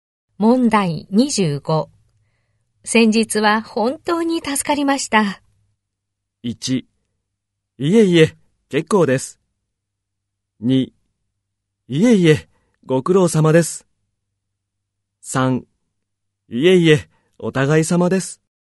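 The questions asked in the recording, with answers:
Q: 先日は本当に助かりました。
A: 3: いえいえ、お互い様です。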